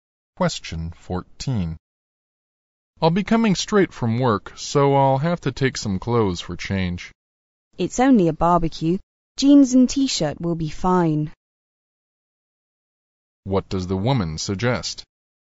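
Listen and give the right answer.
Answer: He doesn't need to bring a change of clothes; jeans and a T-shirt will be fine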